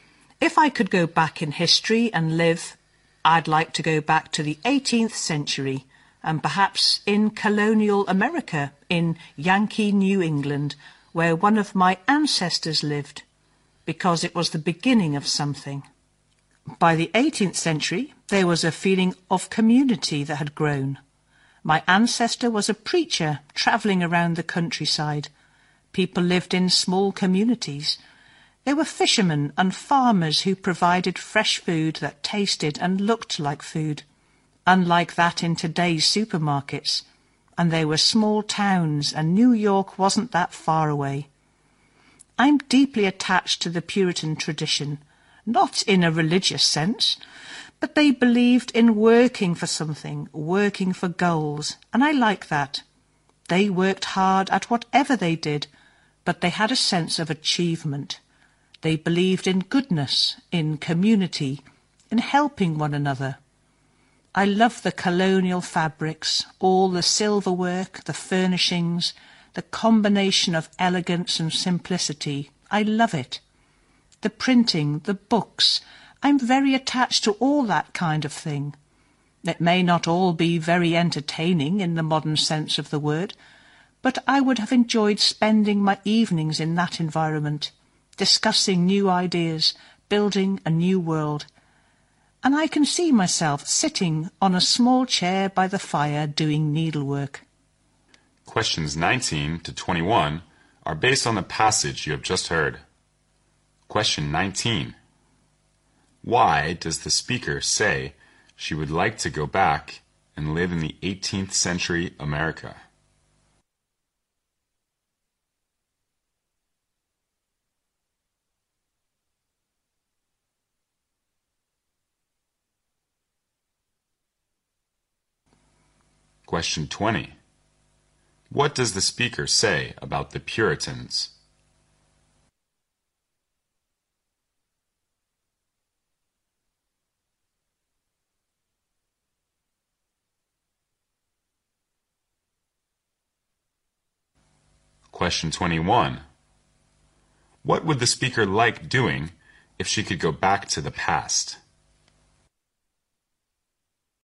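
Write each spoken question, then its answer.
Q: Why does the speaker say she would like to go back and live in the 18th century America?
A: Because it was the beginning of something and one of her ancestors lived there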